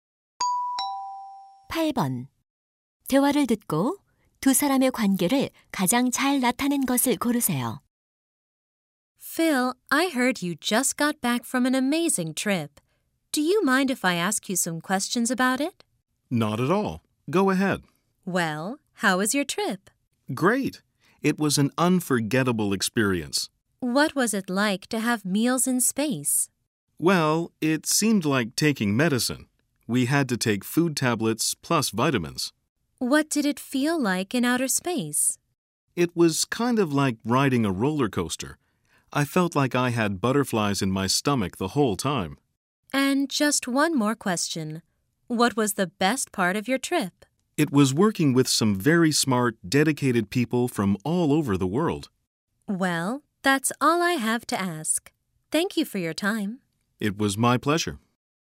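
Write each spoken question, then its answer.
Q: 대화를 듣고 두 사람의 관계를 가장 잘 나타낸 것을 고르세요.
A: 기자 - 우주인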